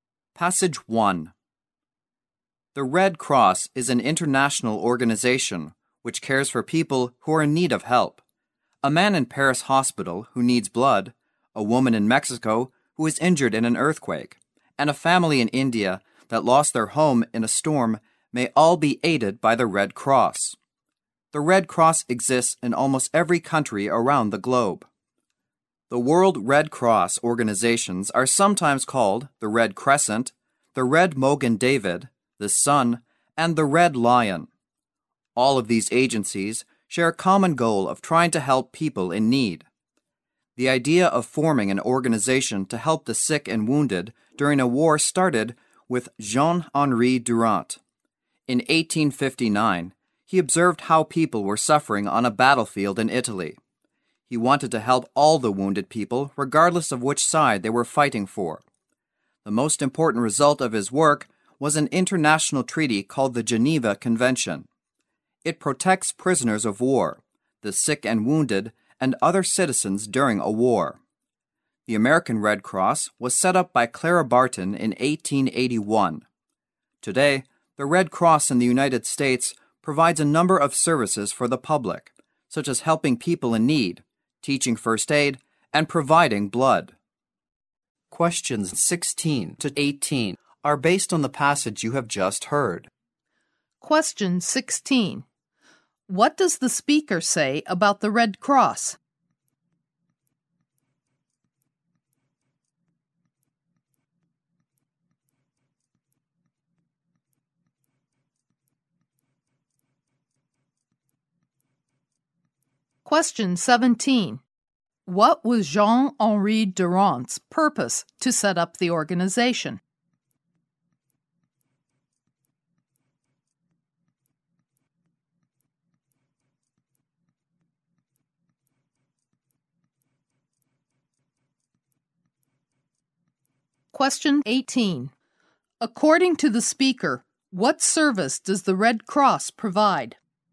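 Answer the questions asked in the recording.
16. It is an international organization that exists in almost every country and helps people in need.
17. To help all the wounded in war, whichever side they fought for.
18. Helping people in need, teaching first aid and providing blood.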